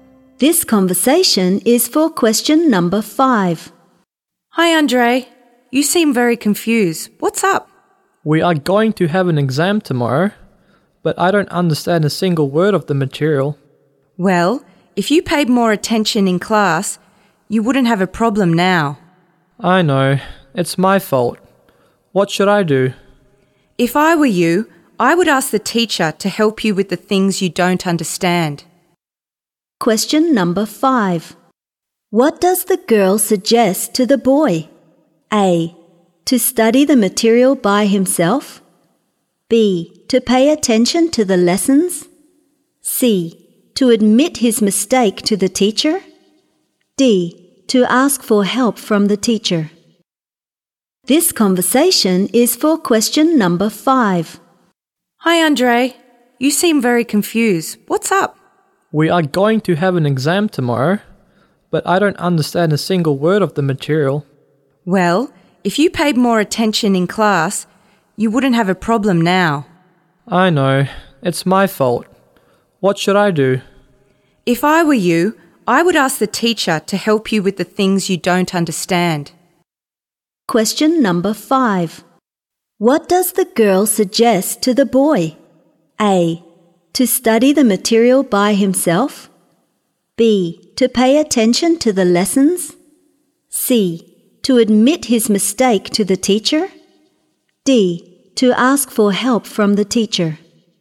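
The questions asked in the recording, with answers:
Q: What does the girl suggest to the boy?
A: D: To ask for help from the teacher.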